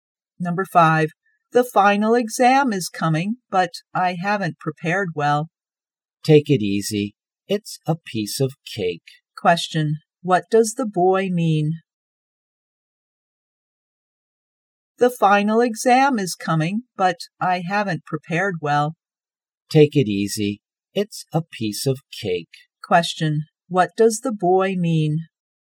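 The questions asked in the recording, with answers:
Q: what does the boy mean?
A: the exam is easy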